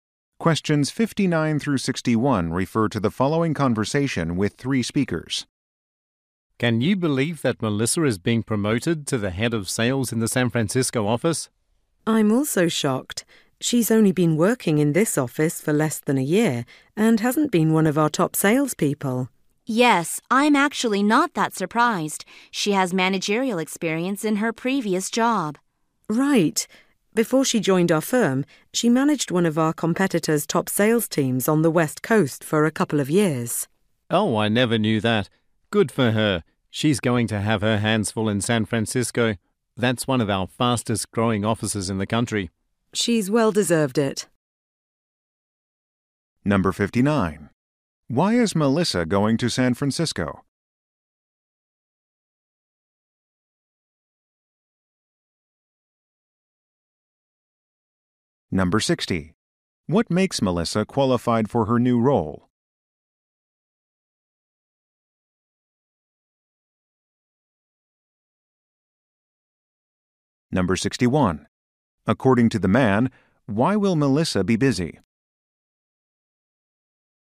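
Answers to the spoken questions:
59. She was promoted to head of sales
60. Previous managerial experience
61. It is one of the fastest growing offices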